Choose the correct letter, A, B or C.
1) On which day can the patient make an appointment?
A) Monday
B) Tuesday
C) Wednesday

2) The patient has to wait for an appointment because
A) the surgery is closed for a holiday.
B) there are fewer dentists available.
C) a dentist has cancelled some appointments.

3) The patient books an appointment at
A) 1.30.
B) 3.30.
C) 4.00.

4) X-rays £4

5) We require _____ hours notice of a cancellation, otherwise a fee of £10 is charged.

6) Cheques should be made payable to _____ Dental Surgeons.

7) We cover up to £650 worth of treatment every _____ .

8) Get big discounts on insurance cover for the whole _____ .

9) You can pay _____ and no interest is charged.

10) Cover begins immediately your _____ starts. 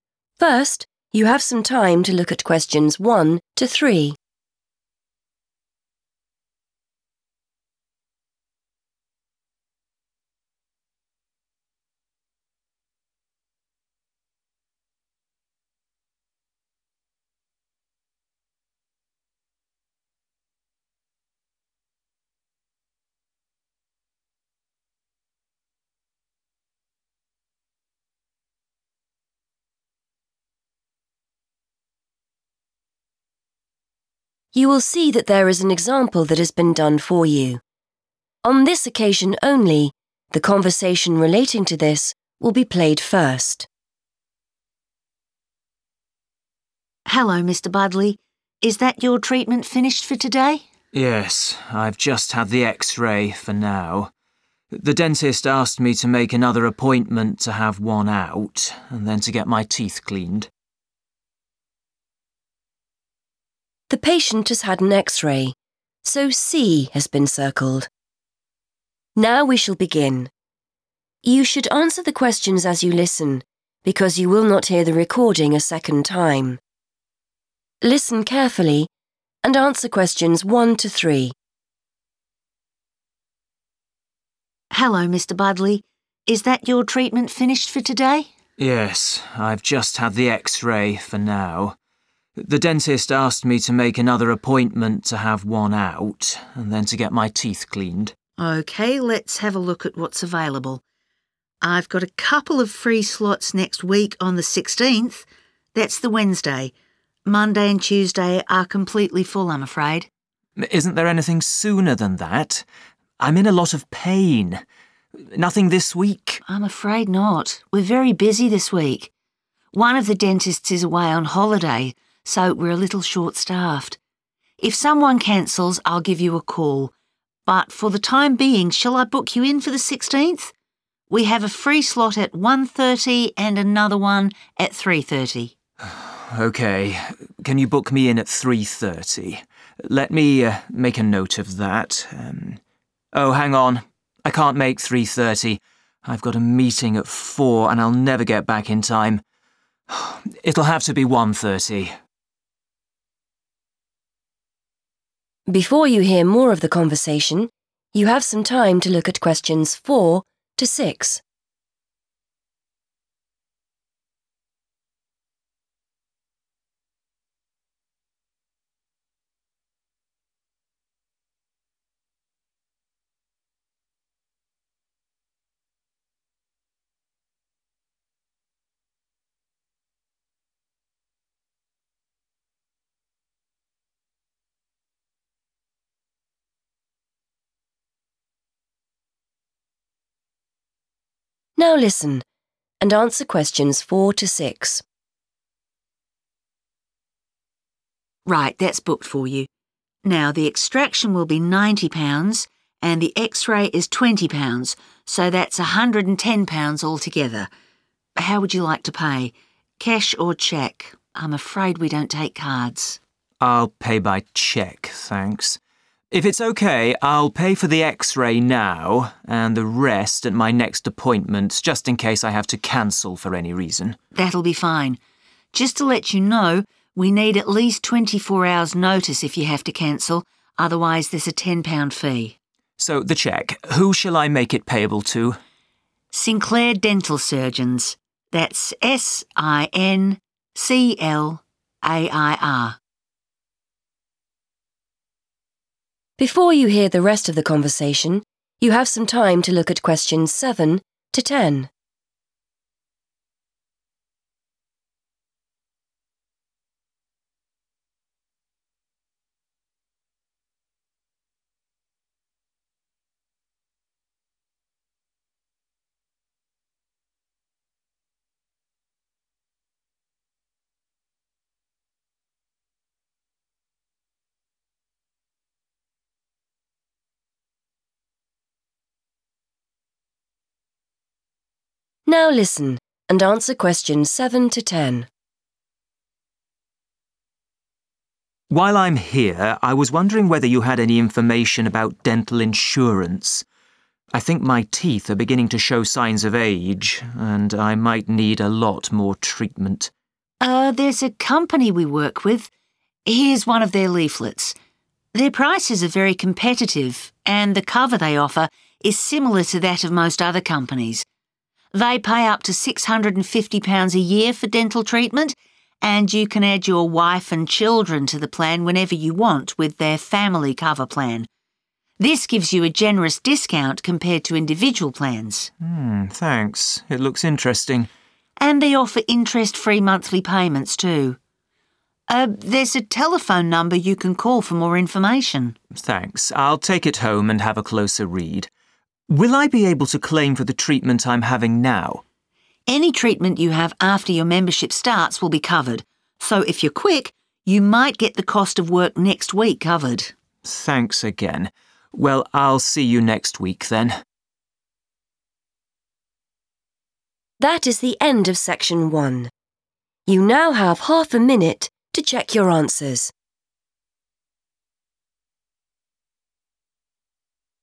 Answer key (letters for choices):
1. C
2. B
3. A
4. 20
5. 24 / twenty-four
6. Sinclair
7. year
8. family
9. monthly / every month
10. membership

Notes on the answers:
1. The correct answer is C because the receptionist clearly states that there is space in the schedule on Wednesday, the 16th. She uses the words "free slots" to mean available times for an appointment. She also explains that Monday and Tuesday are "completely full," which means there is no room for him on those days.
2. The correct answer is B because the receptionist mentions that one of the dentists is away on vacation. As a result, the office is 'short-staffed', which is another way of saying they have fewer employees or dentists available to help patients this week. This explains why the patient cannot get an earlier appointment despite being in pain.
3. The correct answer is A because the patient goes through a process of choosing a time. First, the receptionist offers 1.30 and 3.30. The patient asks for 3.30, but then remembers he has a meeting at 4.00. He realizes that a 3.30 appointment would not give him enough time to finish and get to his meeting. To avoid this, he switches his choice to 1.30. The receptionist confirms the 1.30 slot is booked.
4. The correct answer is 20 because the receptionist explicitly tells the patient the price of each part of his treatment. She mentions that the tooth extraction costs 90 pounds and the X-ray costs 20 pounds. Keywords to look for are 'X-ray' and '£20'.
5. The correct answer is 24 because the receptionist clearly states that the dental office requires a minimum of 24 hours notice if an appointment needs to be cancelled. If the patient fails to give this much notice, they are required to pay a fee of £10. Keywords to notice here are 'notice', 'cancel', and 'fee'.
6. The correct answer is Sinclair because the receptionist tells the patient the exact name to write on the cheque (check) to pay for his treatment. She says "Sinclair Dental Surgeons" and even spells it out (S-I-N-C-L-A-I-R) so the patient makes no mistakes.
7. The correct answer is 'year' because the receptionist explains specifically how much money the insurance company provides for dental work. She says the limit is £650 'a year', which means the same thing as 'every year'.
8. The correct answer is 'family' because the receptionist explains that the dental insurance includes a 'family cover plan.' This plan allows the patient to include his wife and children and provides a 'generous discount' (a big price reduction) compared to buying plans for each person one by one.
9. The correct answer is 'monthly' or 'every month' because the receptionist mentions that the company offers 'interest-free monthly payments'. The word 'monthly' describes how often the payment is made, and 'interest-free' is another way of saying 'no interest is charged'.
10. The correct answer is 'membership' because the receptionist explicitly mentions that any dental work done after the person's membership starts will be paid for by the insurance company. In this context, 'membership' refers to the active status of being in the insurance plan, which aligns with the phrase 'Cover begins' in the notes.

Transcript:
Receptionist: Hello, Mr Budley. Is that your treatment finished for today?
Patient: Yes. I've just had the X-ray for now. The dentist asked me to make another appointment to have one out and then to get my teeth cleaned.
Receptionist: OK, let's have a look at what's available. I've got a couple of free slots next week on the 16th. That's the Wednesday. Monday and Tuesday are completely full, I'm afraid.
Patient: Isn't there anything sooner than that? I'm in a lot of pain. Nothing this week?
Receptionist: I'm afraid not. We're very busy this week. One of the dentists is away on holiday, so we're a little short-staffed. If someone cancels, I'll give you a call, but for the time being shall I book you in for the 16th? We have a free slot at 1.30 and another one at 3.30.
Patient: OK, can you book me in at 3.30? Let me make a note of that. Oh, hang on. I can't make 3.30. I've got a meeting at 4.00 and I'll never get back in time. It'll have to be 1.30.
Receptionist: Right, that's booked for you. Now, the extraction will be £90 and the X-ray is £20, so that's £110 altogether. How would you like to pay? Cash or cheque? I'm afraid we don't take cards.
Patient: I'll pay by cheque, thanks. If it's OK, I'll pay for the X-ray now and the rest at my next appointment, just in case I have to cancel for any reason.
Receptionist: That'll be fine. Just to let you know, we need at least 24 hours notice if you have to cancel, otherwise there's a £10 fee.
Patient: So, the cheque. Who shall I make it payable to?
Receptionist: Sinclair Dental Surgeons. That's S-I-N-C-L-A-I-R.
Patient: While I'm here, I was wondering whether you had any information about dental insurance. I think my teeth are beginning to show signs of age and I might need a lot more treatment.
Receptionist: Er, there's a company we work with ... Here's one of their leaflets. Their prices are very competitive and the cover they offer is similar to that of most other companies. They pay up to £650 a year for dental treatment and you can add your wife and children to the plan whenever you want with their family cover plan. This gives you a generous discount compared to individual plans.
Patient: Thanks. It looks interesting.
Receptionist: And they offer interest-free monthly payments too. Er, there's a telephone number you can call for more information.
Patient: Thanks. I'll take it home and have a closer read. Will I be able to claim for the treatment I'm having now?
Receptionist: Any treatment you have after your membership starts will be covered. So if you're quick, you might get the cost of work next week covered.
Patient: Thanks again. Well, I'll see you next week then.